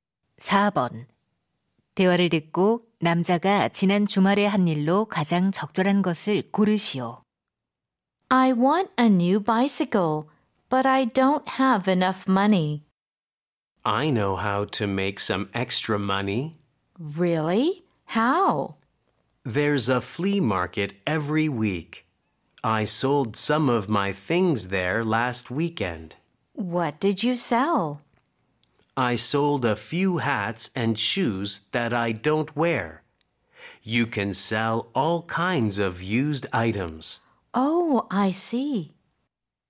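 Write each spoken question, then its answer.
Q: 대화를 듣고 남자가 지난 주말에 한 일로 가장 적절한 것을 고르시오.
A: 벼룩시장에서 물건 팔기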